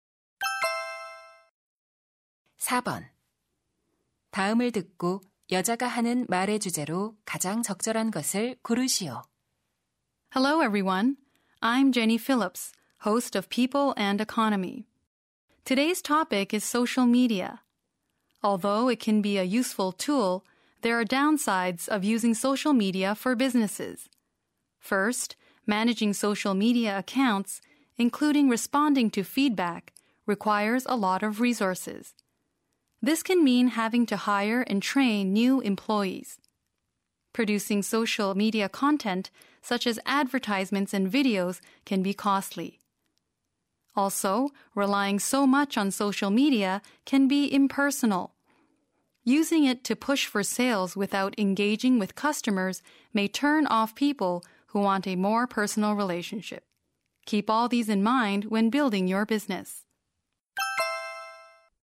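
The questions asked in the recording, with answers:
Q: 다음을 듣고 여자가 하는 말의 주제로 가장 적절한 것을 고르시오.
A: 기업의 소셜 미디어 사용의 단점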